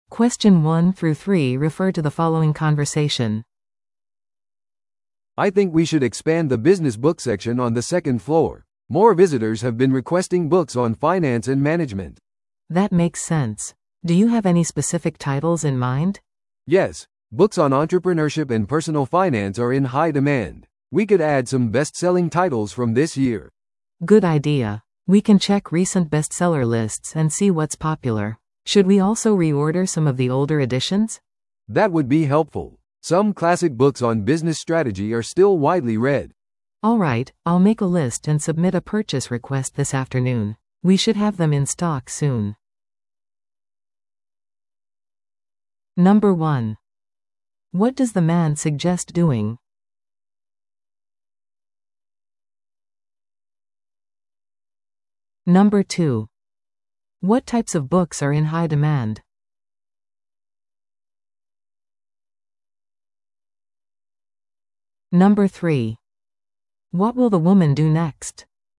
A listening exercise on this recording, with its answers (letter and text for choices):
Listen to the audio below and answer the questions.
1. What does the man suggest doing?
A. 図書館のレイアウトを変更する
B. ビジネス書のエリアを拡張する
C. セミナーを開催する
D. 電子書籍コレクションを作る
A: B. ビジネス書のエリアを拡張する

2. What types of books are in high demand?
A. 小説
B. ビジネス・金融関連の本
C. 歴史書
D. 旅行ガイド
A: B. ビジネス・金融関連の本

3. What will the woman do next?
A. 新しい本を注文する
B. 本を別のエリアに移動する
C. 調査を実施する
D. ブックフェアを開催する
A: A. 新しい本を注文する

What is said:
A: "I think we should expand the business book section on the second floor. More visitors have been requesting books on finance and management."
B: "That makes sense. Do you have any specific titles in mind?"
A: "Yes, books on entrepreneurship and personal finance are in high demand. We could add some bestselling titles from this year."
B: "Good idea. We can check recent bestseller lists and see what's popular. Should we also reorder some of the older editions?"
A: "That would be helpful. Some classic books on business strategy are still widely read."
B: "Alright, I'll make a list and submit a purchase request this afternoon. We should have them in stock soon."